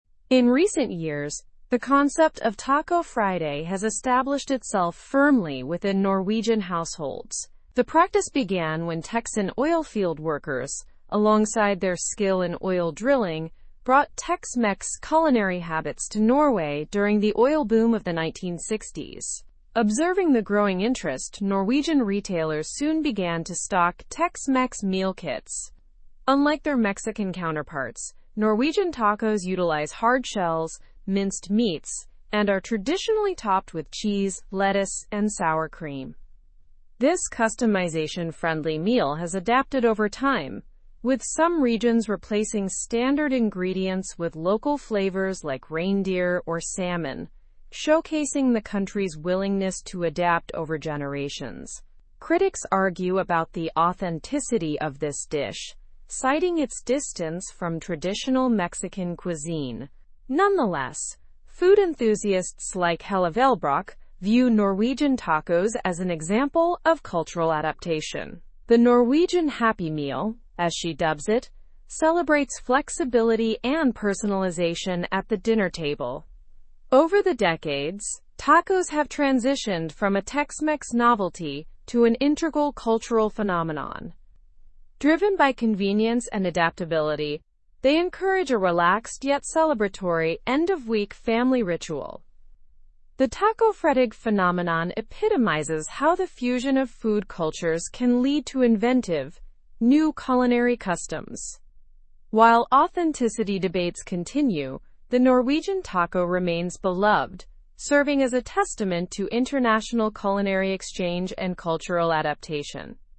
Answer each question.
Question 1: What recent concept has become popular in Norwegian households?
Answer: Taco Friday.

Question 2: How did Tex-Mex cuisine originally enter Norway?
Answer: Via Texan oilfield workers during the oil boom of the 1960s.

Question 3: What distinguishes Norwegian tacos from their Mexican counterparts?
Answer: Norwegian tacos use hard shells and standard toppings like cheese and sour cream.

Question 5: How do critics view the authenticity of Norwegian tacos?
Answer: They question it due to its departure from traditional Mexican cuisine.

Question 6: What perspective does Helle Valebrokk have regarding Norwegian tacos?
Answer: She views them as an example of cultural adaptation, calling them "The Norwegian Happy Meal."

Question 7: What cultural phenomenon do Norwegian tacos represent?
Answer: The fusion of food cultures and international culinary exchange.

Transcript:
In recent years, the concept of Taco Friday has established itself firmly within Norwegian households. The practice began when Texan oilfield workers, alongside their skill in oil drilling, brought Tex-Mex culinary habits to Norway during the oil boom of the 1960s. Observing the growing interest, Norwegian retailers soon began to stock Tex-Mex meal kits. Unlike their Mexican counterparts, Norwegian tacos utilize hard shells, minced meats, and are traditionally topped with cheese, lettuce, and sour cream. This customization-friendly meal has adapted over time, with some regions replacing standard ingredients with local flavors like reindeer or salmon, showcasing the country's willingness to adapt over generations. Critics argue about the authenticity of this dish, citing its distance from traditional Mexican cuisine. Nonetheless, food enthusiasts like Helle Valebrokk view Norwegian tacos as an example of cultural adaptation. "The Norwegian Happy Meal," as she dubs it, celebrates flexibility and personalization at the dinner table. Over the decades, tacos have transitioned from a Tex-Mex novelty to an integral cultural phenomenon. Driven by convenience and adaptability, they encourage a relaxed yet celebratory end-of-week family ritual. The tacofredag phenomenon epitomizes how the fusion of food cultures can lead to inventive, new culinary customs. While authenticity debates continue, the Norwegian taco remains beloved, serving as a testament to international culinary exchange and cultural adaptation.

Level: Level 4